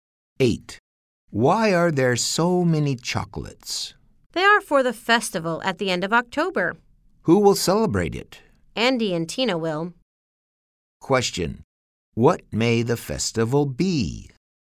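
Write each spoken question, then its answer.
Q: What may the festival be?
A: Halloween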